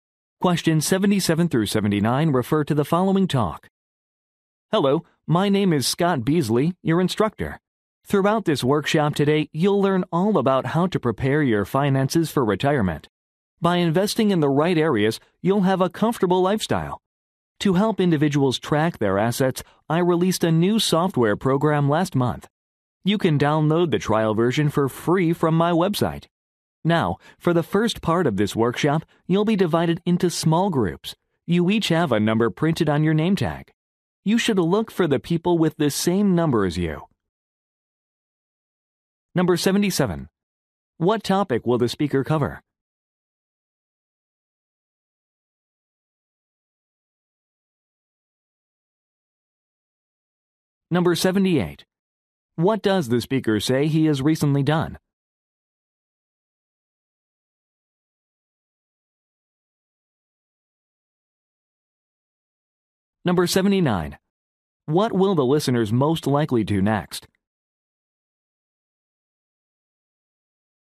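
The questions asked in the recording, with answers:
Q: What topic will the speaker cover?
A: Preparing finances for retirement

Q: What does the speaker say he has recently done?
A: Released a new software program

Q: What will the listeners most likely do next?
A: Form small groups by the numbers on their name tags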